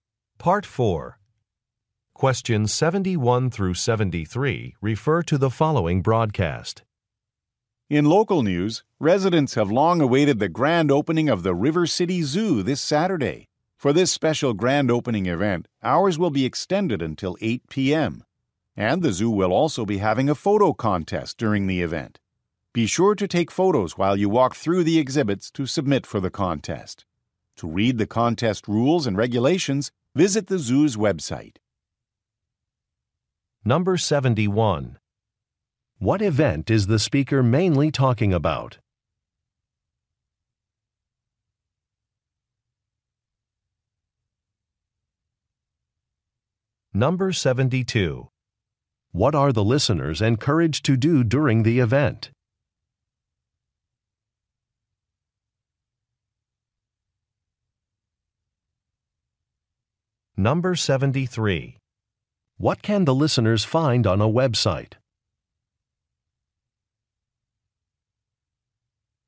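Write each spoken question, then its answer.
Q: What event is the speaker mainly talking about?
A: The grand opening of the River City Zoo

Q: What are the listeners encouraged to do during the event?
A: Take photos for a photo contest

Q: What can the listeners find on a website?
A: The contest rules and regulations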